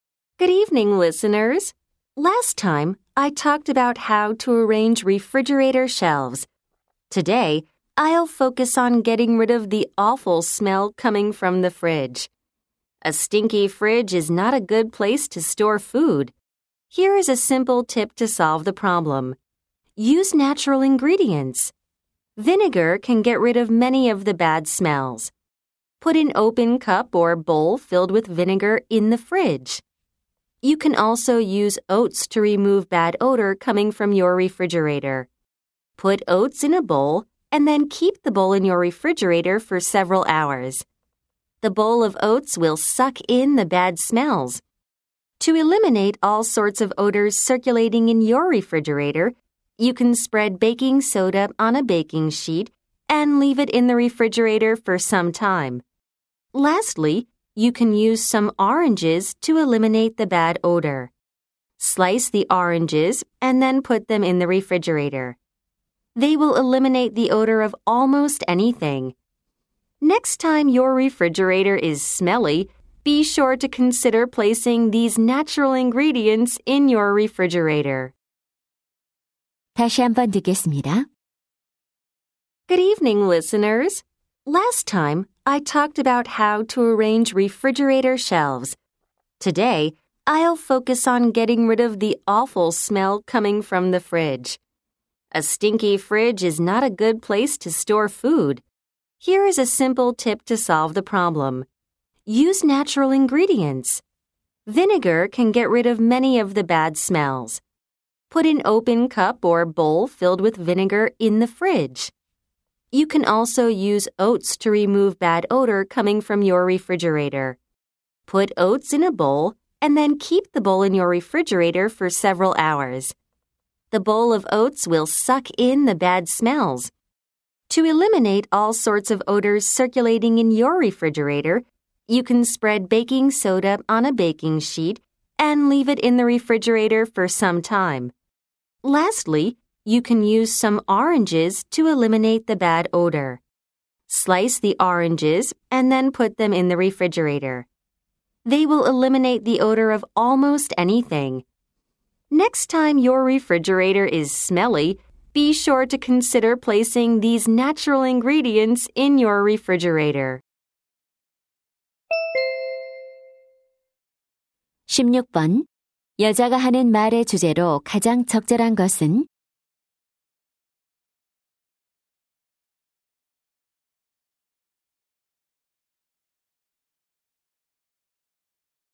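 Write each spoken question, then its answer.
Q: 여자가 하는 말의 주제로 가장 적절한 것은?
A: 천연 재료로 냉장고 악취를 없애는 방법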